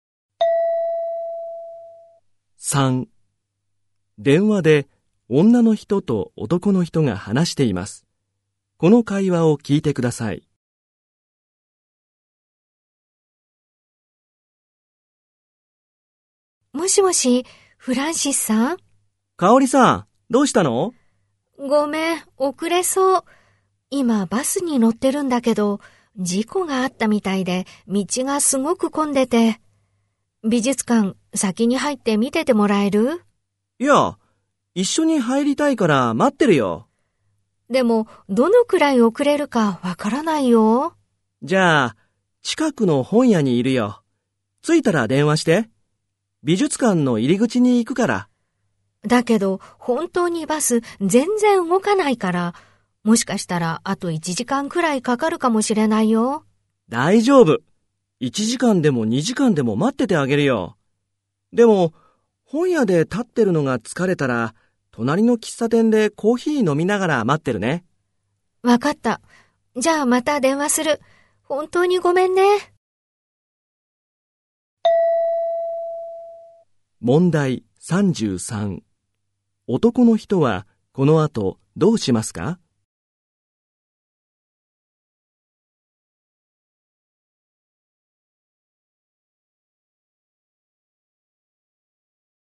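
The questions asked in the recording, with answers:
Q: 男の人はこの後どうしますか?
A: 近くの本屋で待つ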